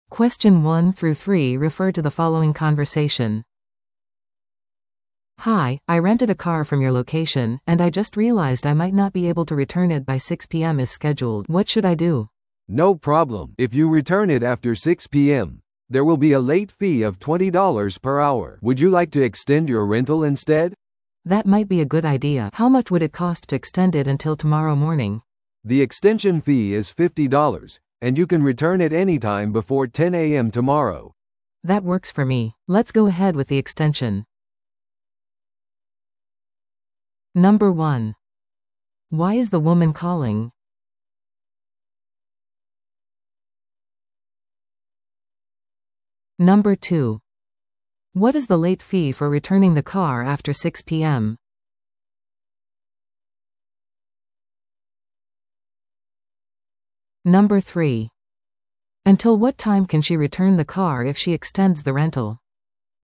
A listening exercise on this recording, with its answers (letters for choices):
Listen to the audio below and answer the questions.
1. 女性はなぜ電話をしていますか?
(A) 新しいレンタカーの予約をするため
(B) レンタル車を変更するため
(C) レンタカーの返却が遅れることについて問い合わせるため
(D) 車の問題を報告するため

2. 18時以降に車を返却するといくらの追加料金がかかりますか?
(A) 1時間あたり10ドル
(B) 1時間あたり20ドル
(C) 1時間あたり50ドル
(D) 追加料金なし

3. レンタルを延長した場合、何時までに返却すればよいですか?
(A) 午前8時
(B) 午前9時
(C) 午前10時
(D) 正午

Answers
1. C
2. B
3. C

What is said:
A: "Hi, I rented a car from your location, and I just realized I might not be able to return it by 6 PM as scheduled. What should I do?"
B: "No problem! If you return it after 6 PM, there will be a late fee of $20 per hour. Would you like to extend your rental instead?"
A: "That might be a good idea. How much would it cost to extend it until tomorrow morning?"
B: "The extension fee is $50, and you can return it anytime before 10 AM tomorrow."
A: "That works for me. Let's go ahead with the extension."